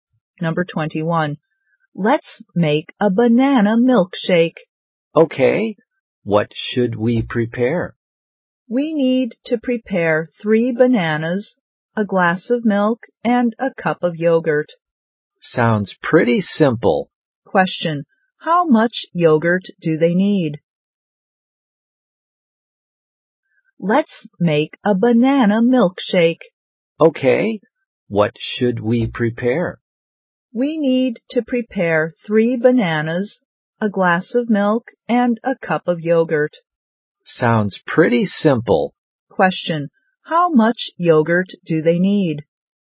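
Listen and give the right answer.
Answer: A cup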